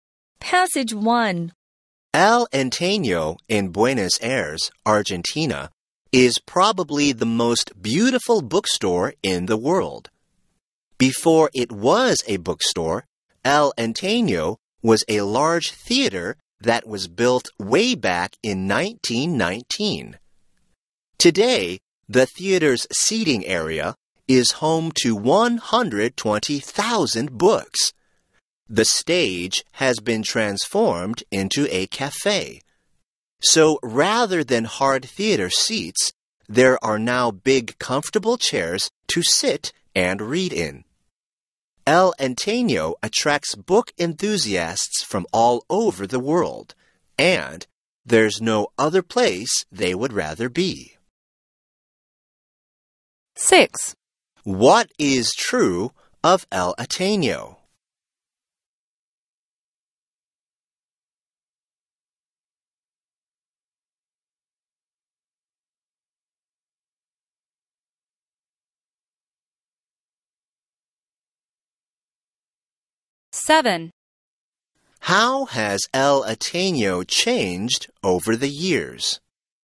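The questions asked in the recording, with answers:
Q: What is true of El Antaño?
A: It is a bookstore in Buenos Aires, probably the most beautiful in the world, in a former theater

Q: How has El Antaño changed over the years?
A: A 1919 theater became a bookstore; the stage is now a cafe and seats were replaced with comfortable chairs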